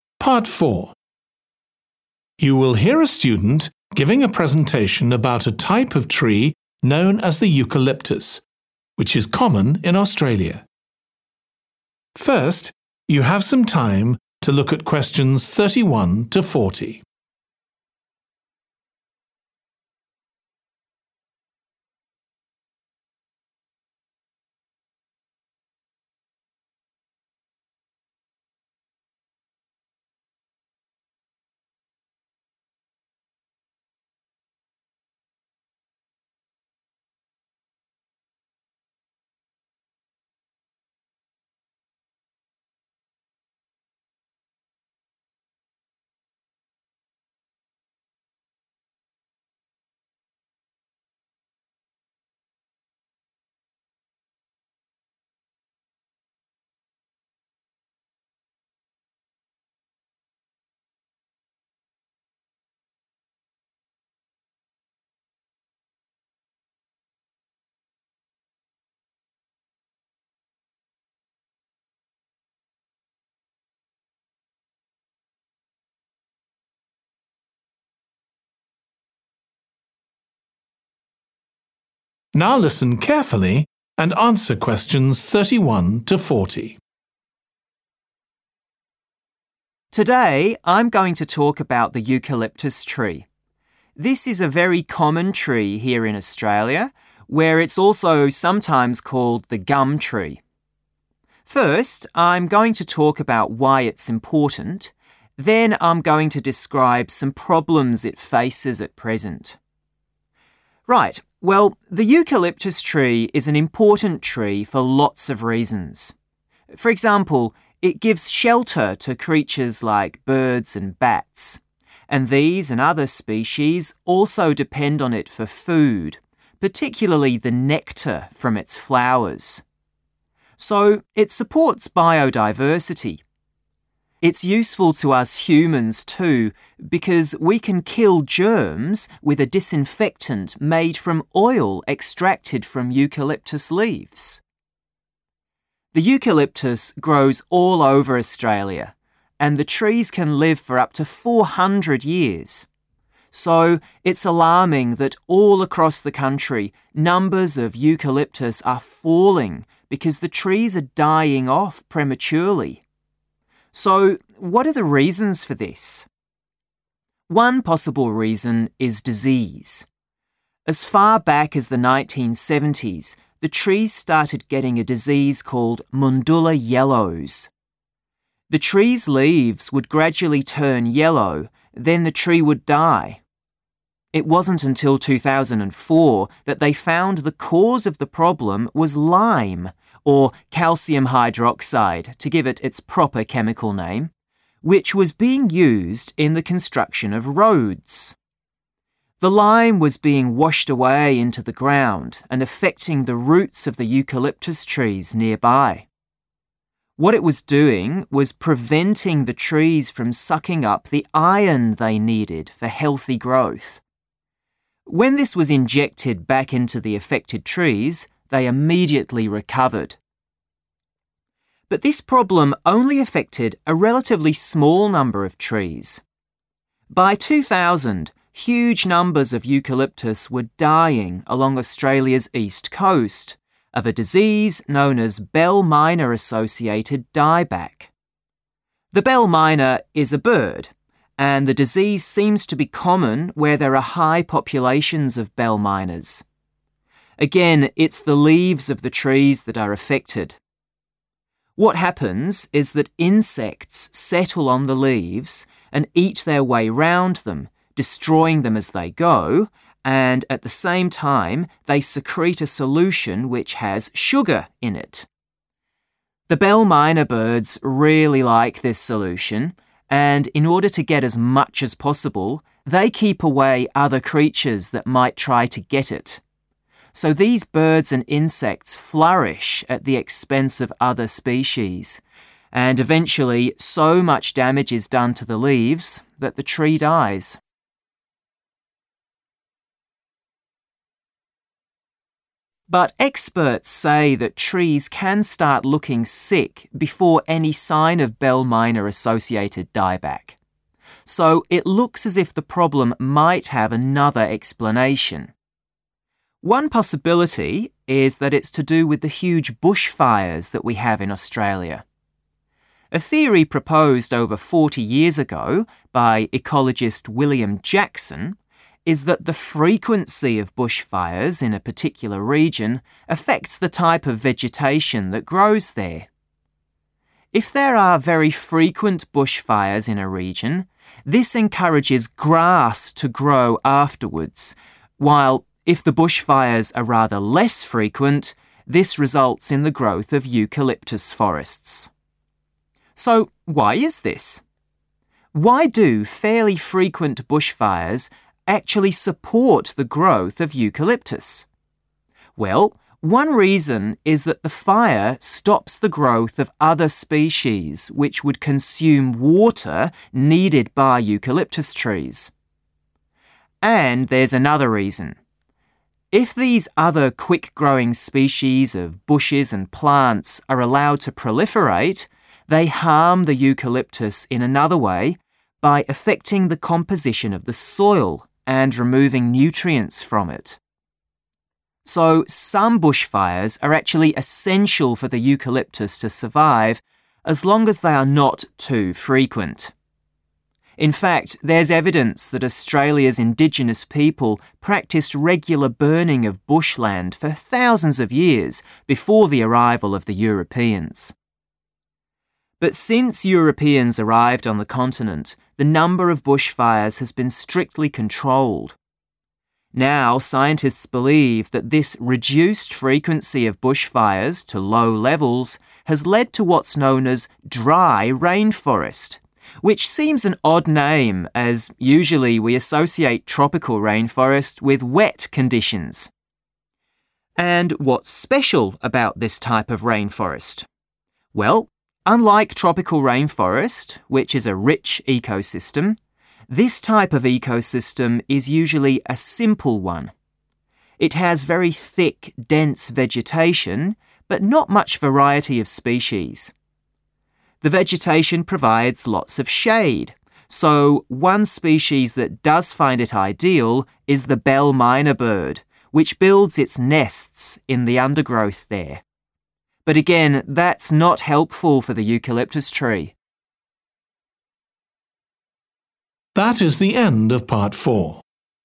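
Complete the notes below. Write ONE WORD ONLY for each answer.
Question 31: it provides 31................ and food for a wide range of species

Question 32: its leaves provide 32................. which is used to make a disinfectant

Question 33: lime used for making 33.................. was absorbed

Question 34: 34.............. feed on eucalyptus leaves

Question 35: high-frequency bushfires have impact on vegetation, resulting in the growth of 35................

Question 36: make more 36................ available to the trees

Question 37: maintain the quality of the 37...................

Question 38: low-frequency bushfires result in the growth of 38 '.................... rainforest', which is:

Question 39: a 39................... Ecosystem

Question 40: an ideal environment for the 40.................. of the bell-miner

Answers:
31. shelter
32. oil
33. roads
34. insects
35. grass
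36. water
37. soil
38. dry
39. simple
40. nests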